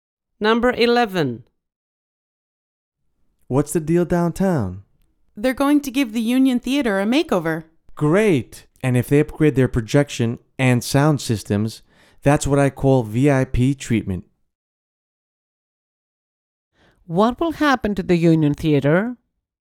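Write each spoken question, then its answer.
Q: What will happen to the Union Theater?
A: It will be renovated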